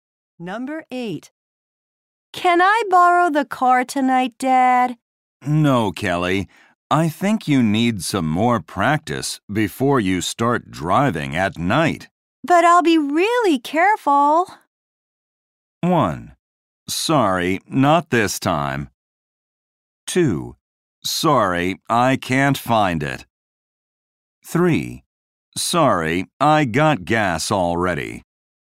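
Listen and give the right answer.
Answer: 1: Sorry, not this time.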